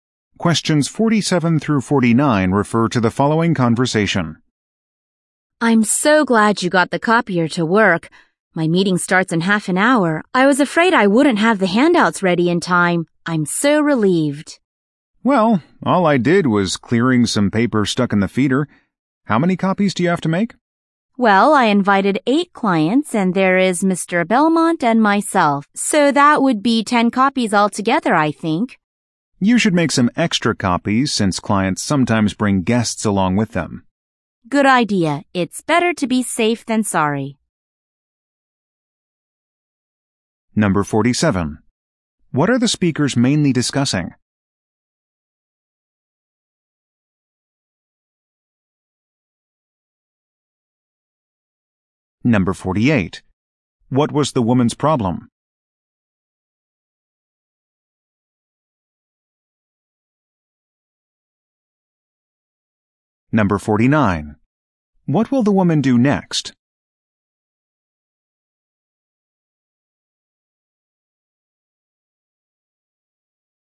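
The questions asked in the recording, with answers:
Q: What are the speakers mainly discussing?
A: Making copies of handouts for a meeting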